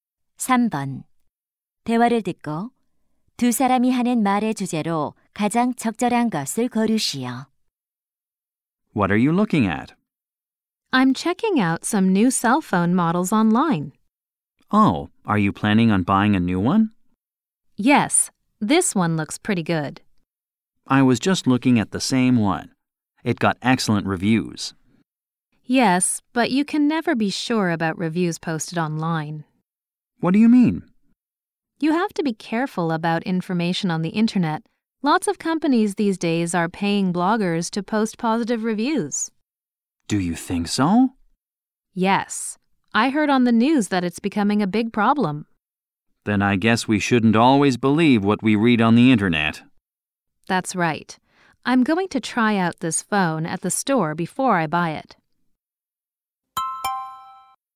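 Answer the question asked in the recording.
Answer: 인터넷 상품 후기를 맹신하면 안 된다.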